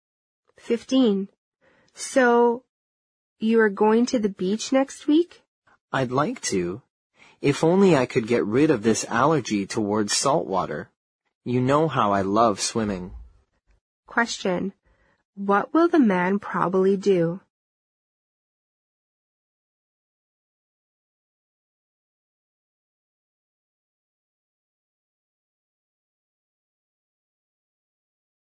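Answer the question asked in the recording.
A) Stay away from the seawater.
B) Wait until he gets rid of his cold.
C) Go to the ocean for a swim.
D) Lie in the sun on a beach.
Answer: A) Stay away from the seawater.

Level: 六级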